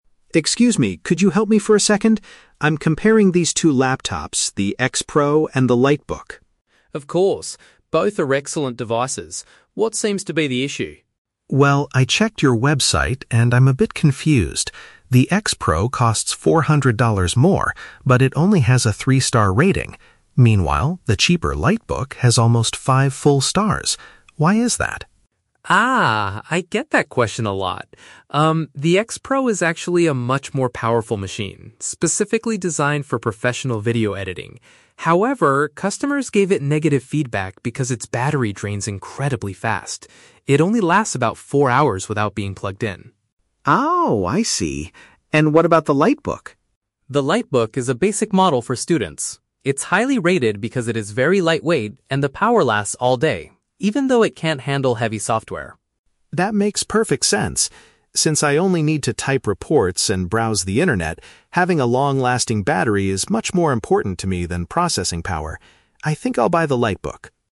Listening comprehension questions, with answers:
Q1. Why is the customer confused about the X-Pro laptop?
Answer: It has a high price but poor customer feedback.

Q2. According to the employee, what is the main problem with the X-Pro?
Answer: It runs out of power very quickly.

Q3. What will the customer most likely do next?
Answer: Purchase the computer that is better for students.

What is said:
Alex: Excuse me, could you help me for a second? I'm comparing these two laptops, the X-Pro and the LiteBook.
Rachel: Of course! Both are excellent devices. What seems to be the issue?
Alex: Well, I checked your website, and I'm a bit confused. The X-Pro costs four hundred dollars more, but it only has a three-star rating. Meanwhile, the cheaper LiteBook has almost five full stars. Why is that?
Rachel: Ah, I get that question a lot. Um, the X-Pro is actually a much more powerful machine, specifically designed for professional video editing. However, customers gave it negative feedback because its battery drains incredibly fast. It only lasts about four hours without being plugged in.
Alex: Oh, I see. And what about the LiteBook?
Rachel: The LiteBook is a basic model for students. It's highly rated because it is very lightweight and the power lasts all day, even though it can't handle heavy software.
Alex: That makes perfect sense. Since I only need to type reports and browse the internet, having a long-lasting battery is much more important to me than processing power. I think I'll buy the LiteBook.